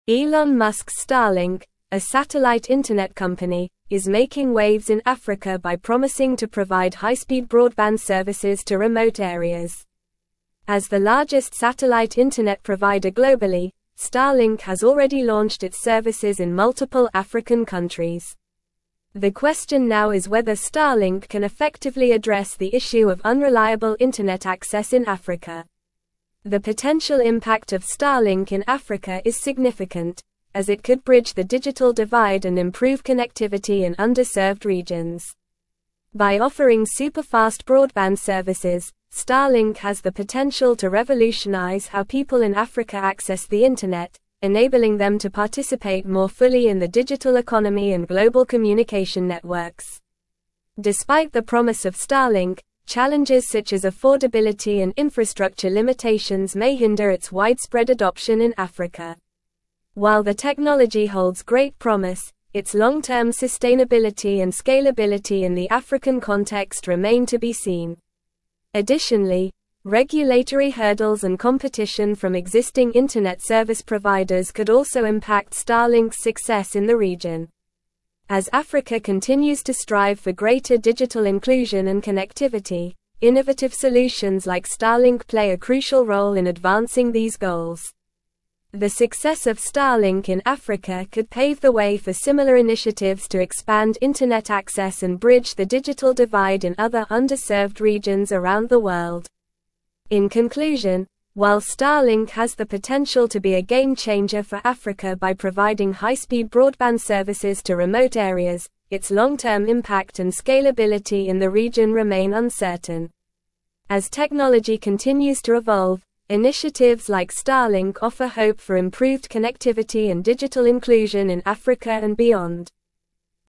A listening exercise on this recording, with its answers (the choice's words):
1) Elon Musk's Starlink, a satellite internet (1)______, is making waves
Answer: company

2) high-speed broadband services to remote (2)______.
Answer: areas

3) As the (3)______ satellite internet provider globally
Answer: largest

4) launched its services in multiple (4)______ countries.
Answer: African

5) improve connectivity in (5)______ regions.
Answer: underserved

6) Starlink has the (6)______ to revolutionize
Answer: potential

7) enabling them to (7)______ more fully in the digital (8)______ and global communication networks.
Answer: participate

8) more fully in the digital (8)______ and global communication networks.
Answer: economy

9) Additionally, regulatory (9)______ and competition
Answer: hurdles

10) could also (10)______ (11)______'s success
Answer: impact

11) (11)______'s success in the (12)______.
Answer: Starlink

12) success in the (12)______.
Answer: region

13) similar initiatives to expand (13)______ access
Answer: internet

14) As technology (14)______ to (15)______,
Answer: continues

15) to (15)______, initiatives like Starlink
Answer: evolve

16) improved connectivity and digital (16)______ in Africa and beyond.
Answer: inclusion

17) What is the main focus of Elon Musk's Starlink in Africa?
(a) Launching space missions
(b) Building electric cars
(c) Developing renewable energy sources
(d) Providing high-speed broadband services to remote areas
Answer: Providing high-speed broadband services to remote areas

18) What is one potential impact of Starlink in Africa?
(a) Bridging the digital divide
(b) Decreasing access to the internet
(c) Slowing down internet speeds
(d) Limiting global communication networks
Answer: Bridging the digital divide

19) What are some challenges that could hinder Starlink's adoption in Africa?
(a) Overabundance of internet access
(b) Lack of interest in high-speed internet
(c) Affordability and infrastructure limitations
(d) Excessive government support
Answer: Affordability and infrastructure limitations

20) What role do innovative solutions like Starlink play in Africa?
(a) Limiting access to the internet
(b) Advancing digital inclusion and connectivity goals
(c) Decreasing global communication networks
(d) Slowing down technological advancements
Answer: Advancing digital inclusion and connectivity goals

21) What could impact Starlink's success in Africa?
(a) Lack of interest in high-speed internet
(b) Excessive government support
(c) Regulatory hurdles and competition from existing internet service providers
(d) Overabundance of internet access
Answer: Regulatory hurdles and competition from existing internet service providers

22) What does the article suggest about the long-term impact and scalability of Starlink in Africa?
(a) Remain uncertain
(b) Guaranteed success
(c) Limited potential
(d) Decreased connectivity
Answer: Remain uncertain

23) What hope do initiatives like Starlink offer for Africa and beyond?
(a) Decreased global communication networks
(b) Improved connectivity and digital inclusion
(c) Slower technological advancements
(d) Increased digital divide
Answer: Improved connectivity and digital inclusion

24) What could pave the way for similar initiatives to expand internet access globally?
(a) Failure of Starlink in Africa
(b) Lack of interest in high-speed internet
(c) Overabundance of internet access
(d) Success of Starlink in Africa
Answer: Success of Starlink in Africa

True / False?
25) The success of Starlink in Africa could set a precedent for similar initiatives in other underserved regions globally.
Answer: True

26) Starlink has already launched its services in multiple African countries, making it the largest satellite internet provider globally.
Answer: True

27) Innovative solutions like Starlink are crucial for advancing digital inclusion and connectivity goals in Africa.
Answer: True

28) The technology provided by Starlink may not revolutionize how people in Africa access the internet, potentially limiting participation in the digital economy.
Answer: False

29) Competition from existing internet service providers could also impact the success of Starlink in Africa.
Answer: True

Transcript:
Elon Musk's Starlink, a satellite internet company, is making waves in Africa by promising to provide high-speed broadband services to remote areas. As the largest satellite internet provider globally, Starlink has already launched its services in multiple African countries. The question now is whether Starlink can effectively address the issue of unreliable internet access in Africa.
The potential impact of Starlink in Africa is significant, as it could bridge the digital divide and improve connectivity in underserved regions. By offering superfast broadband services, Starlink has the potential to revolutionize how people in Africa access the internet, enabling them to participate more fully in the digital economy and global communication networks.
Despite the promise of Starlink, challenges such as affordability and infrastructure limitations may hinder its widespread adoption in Africa. While the technology holds great promise, its long-term sustainability and scalability in the African context remain to be seen. Additionally, regulatory hurdles and competition from existing internet service providers could also impact Starlink's success in the region.
As Africa continues to strive for greater digital inclusion and connectivity, innovative solutions like Starlink play a crucial role in advancing these goals. The success of Starlink in Africa could pave the way for similar initiatives to expand internet access and bridge the digital divide in other underserved regions around the world.
In conclusion, while Starlink has the potential to be a game-changer for Africa by providing high-speed broadband services to remote areas, its long-term impact and scalability in the region remain uncertain. As technology continues to evolve, initiatives like Starlink offer hope for improved connectivity and digital inclusion in Africa and beyond.

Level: Level 4